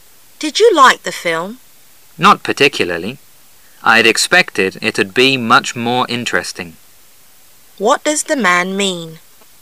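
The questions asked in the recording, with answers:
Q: What does the man mean?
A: He didn't like the film much; it was less interesting than he expected.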